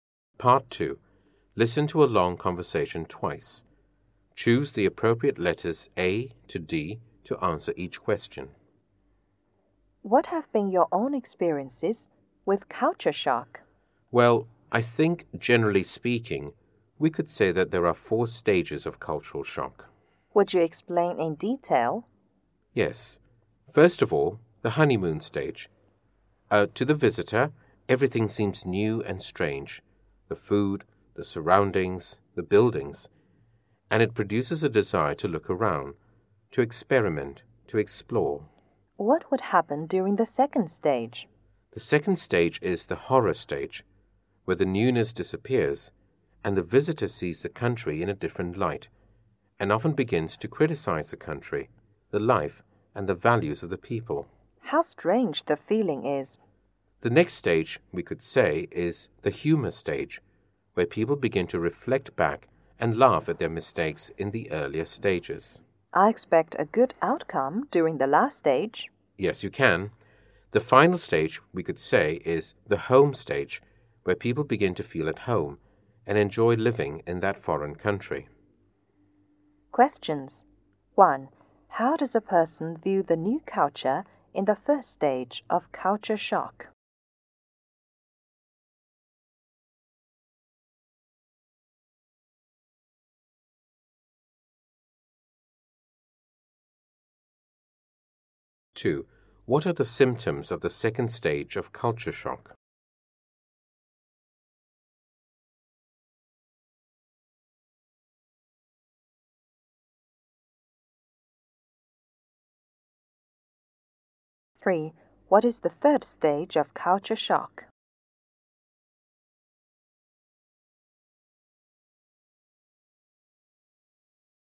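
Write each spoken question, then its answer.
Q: How does a person view the new culture in the first stage of culture shock?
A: Everything seems new and strange, and he wants to explore it

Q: What are the symptoms of the second stage of culture shock?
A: The newness disappears and the visitor criticizes the country, its life and its values

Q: What is the third stage of culture shock?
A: The humor stage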